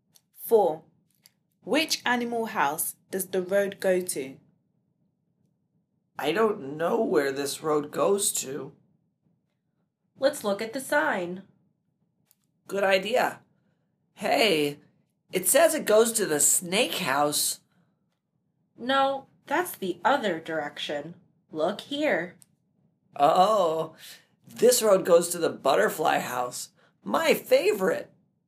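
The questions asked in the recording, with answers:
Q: Which animal house does the road go to?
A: The butterfly house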